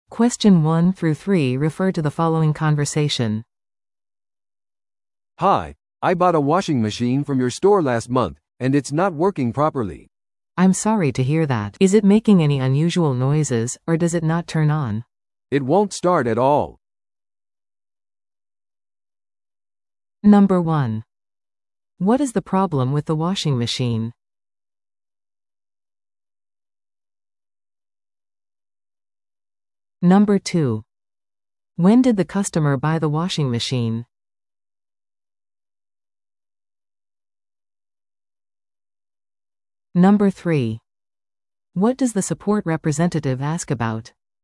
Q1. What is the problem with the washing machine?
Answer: 電源が入らない

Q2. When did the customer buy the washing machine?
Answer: 先月

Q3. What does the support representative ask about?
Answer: 異音がするかどうか